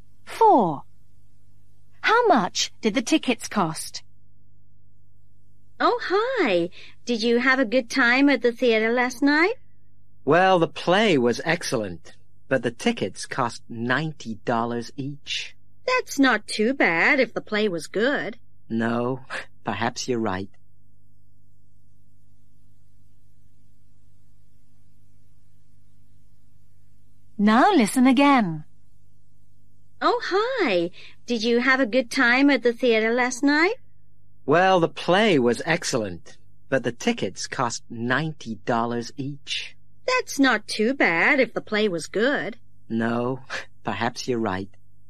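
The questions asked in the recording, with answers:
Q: How much did the tickets cost?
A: $90 each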